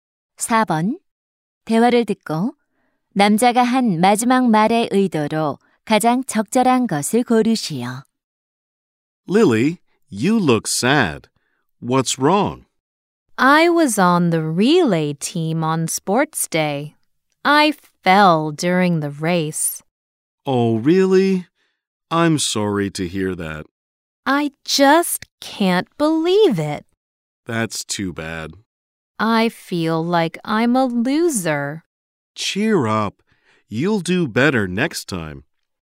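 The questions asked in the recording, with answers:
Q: 대화를 듣고 남자가 한 마지막 말의 의도로 가장 적절한 것을 고르시오.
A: 격려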